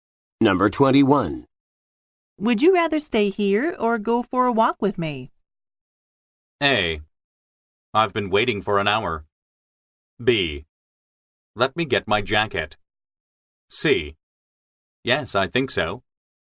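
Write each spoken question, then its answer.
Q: Would you rather stay here or go for a walk with me?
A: B: Let me get my jacket.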